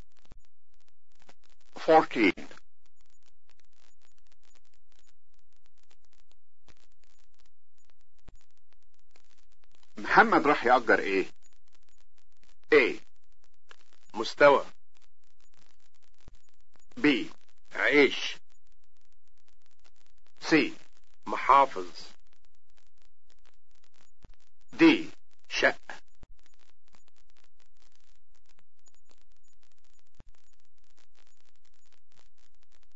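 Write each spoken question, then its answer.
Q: محمد راح يأجر ايه؟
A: D: شقة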